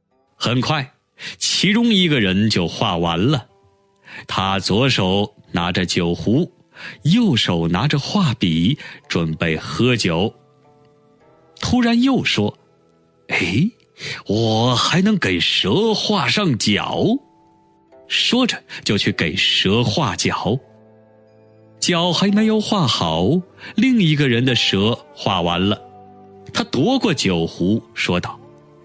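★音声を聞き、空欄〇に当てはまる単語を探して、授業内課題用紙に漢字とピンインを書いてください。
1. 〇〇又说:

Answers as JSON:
{"1": "突然"}

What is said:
1. 很快其中一个人就画完了。
2. 他左手拿着酒壶,右手拿着画笔,〇〇喝酒。
4. "我还能给蛇画上脚。"
5. 说着就去给蛇画脚。
6. 脚还没有画好,另一个人的蛇画完了。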